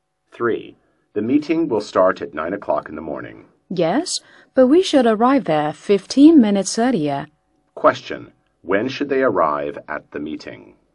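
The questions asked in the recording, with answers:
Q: When should they arrive at the meeting?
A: At 8:45 in the morning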